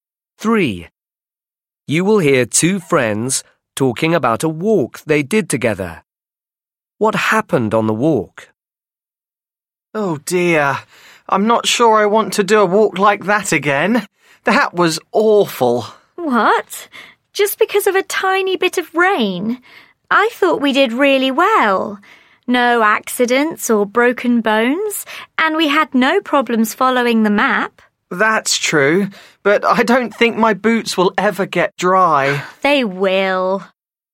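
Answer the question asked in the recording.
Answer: It rained and they got wet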